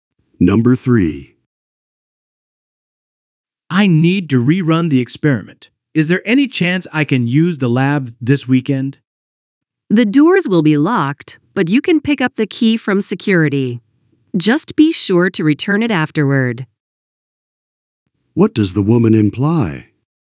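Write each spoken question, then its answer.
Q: What does the woman imply?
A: The man can use the lab this weekend if he gets the key from security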